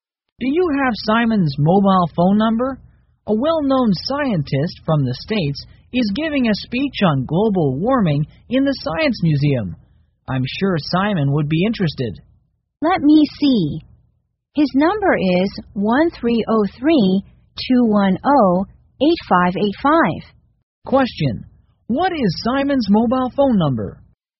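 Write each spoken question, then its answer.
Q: What is Simon's mobile phone number?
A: 1-303-210-8585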